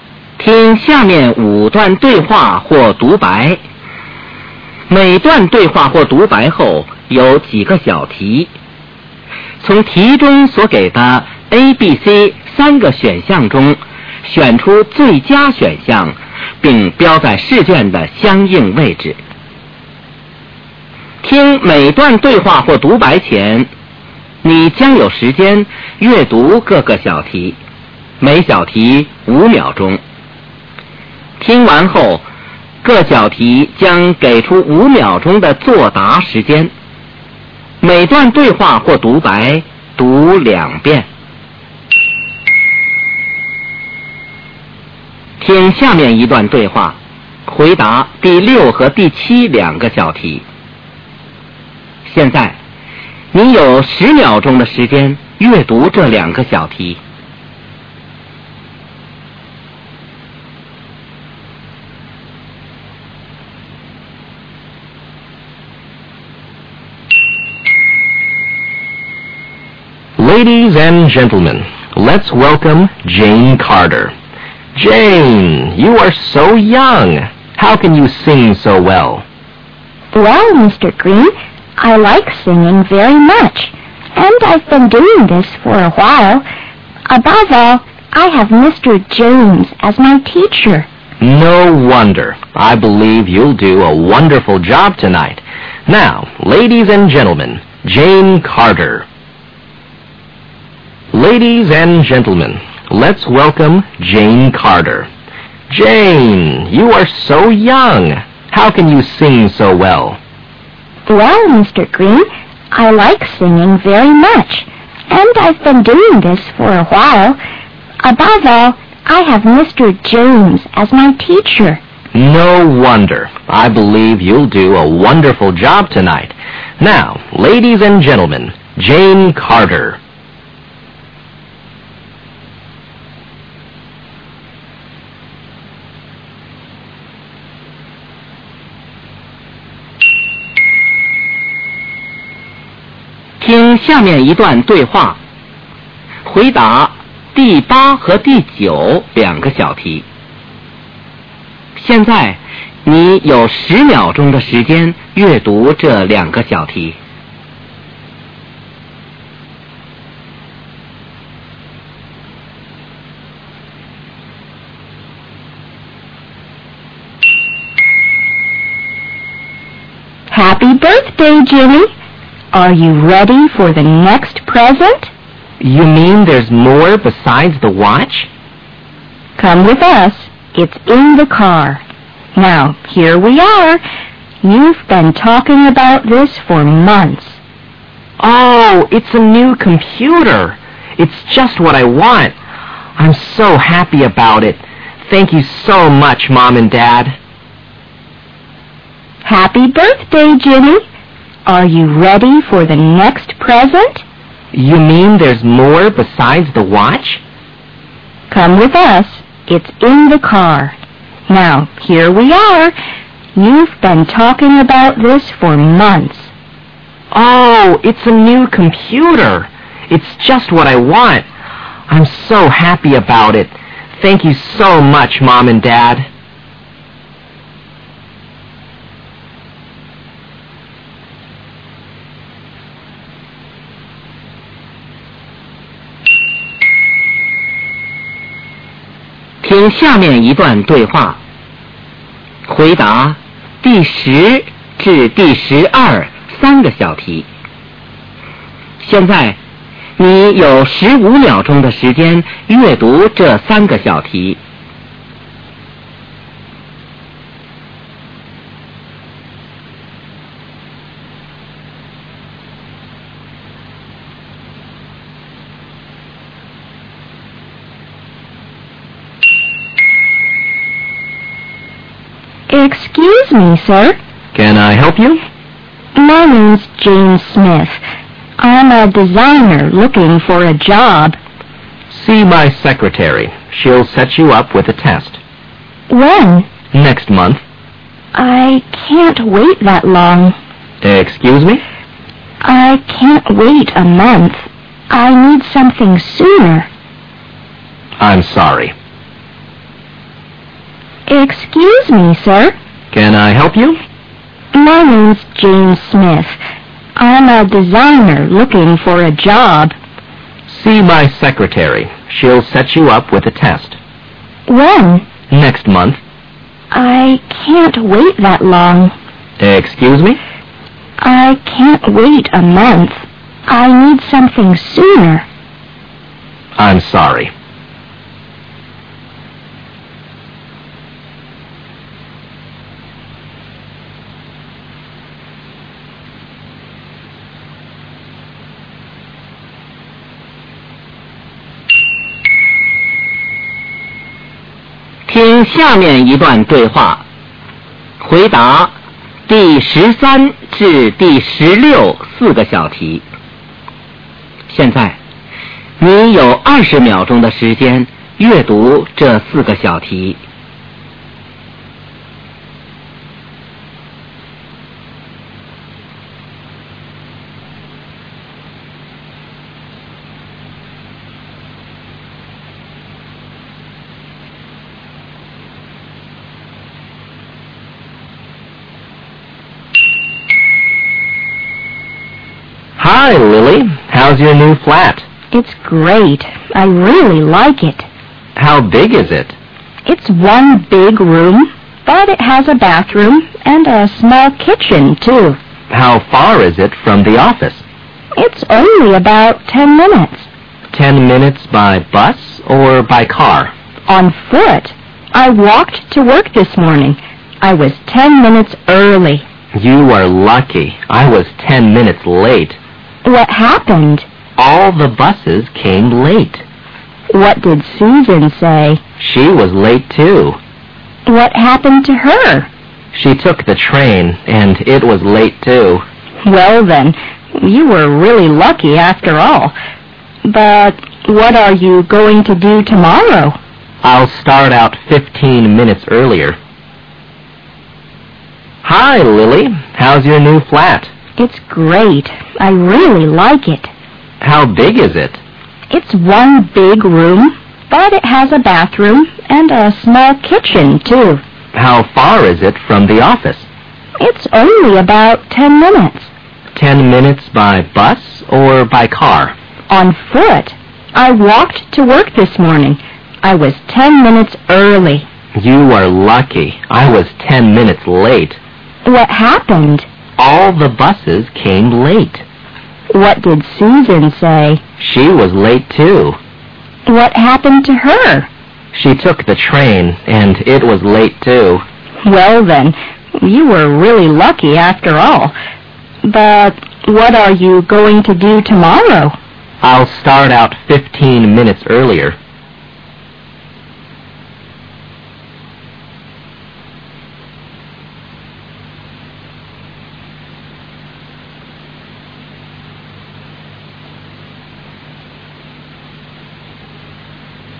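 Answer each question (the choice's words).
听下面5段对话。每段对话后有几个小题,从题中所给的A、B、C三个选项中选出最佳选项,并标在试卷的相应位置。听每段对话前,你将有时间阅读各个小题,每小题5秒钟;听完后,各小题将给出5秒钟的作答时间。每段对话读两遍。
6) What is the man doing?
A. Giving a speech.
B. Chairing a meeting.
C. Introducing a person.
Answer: Introducing a person.

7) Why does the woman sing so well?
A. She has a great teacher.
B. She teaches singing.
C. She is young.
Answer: She has a great teacher.

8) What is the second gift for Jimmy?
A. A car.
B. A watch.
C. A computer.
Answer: A computer.

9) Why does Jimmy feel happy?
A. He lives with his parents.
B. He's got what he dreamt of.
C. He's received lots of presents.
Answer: He's got what he dreamt of.

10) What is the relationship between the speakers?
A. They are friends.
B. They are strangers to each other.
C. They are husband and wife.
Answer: They are strangers to each other.

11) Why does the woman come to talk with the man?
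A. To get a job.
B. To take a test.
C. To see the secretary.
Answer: To get a job.

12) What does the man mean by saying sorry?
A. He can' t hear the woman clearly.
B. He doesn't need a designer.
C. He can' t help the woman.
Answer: He can' t help the woman.

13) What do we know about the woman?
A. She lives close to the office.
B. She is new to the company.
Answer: She lives close to the office.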